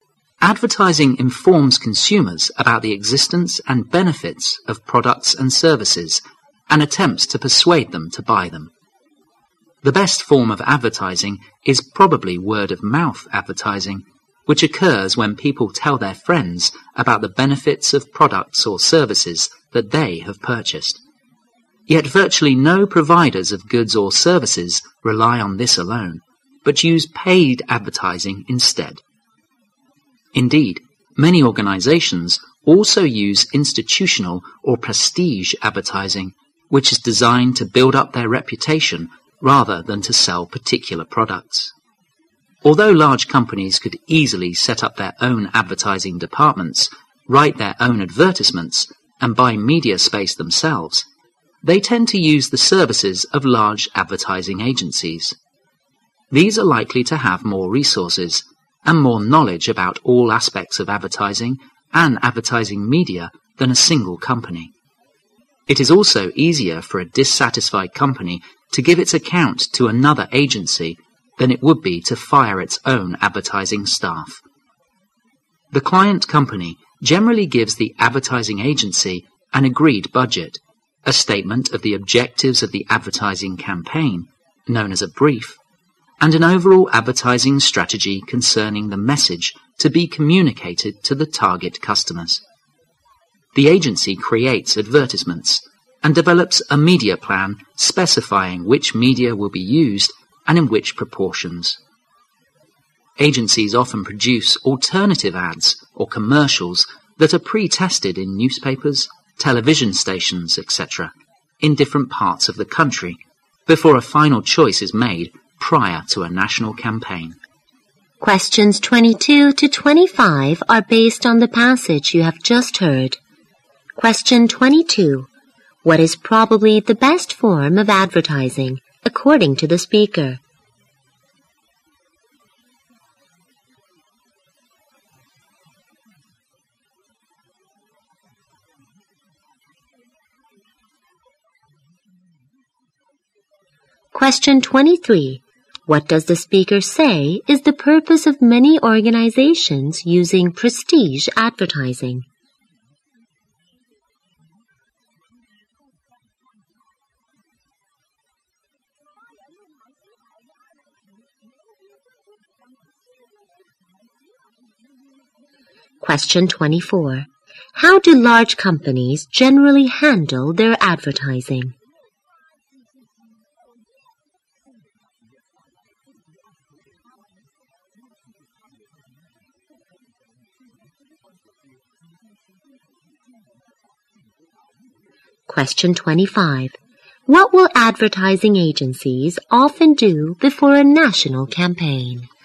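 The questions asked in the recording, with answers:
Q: What is probably the best form of advertising, according to the speaker?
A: Word-of-mouth advertising

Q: What does the speaker say is the purpose of many organizations using prestige advertising?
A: To build up their reputation

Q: How do large companies generally handle their advertising?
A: They use the services of large advertising agencies

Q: What will advertising agencies often do before a national campaign?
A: Pre-test alternative ads in different parts of the country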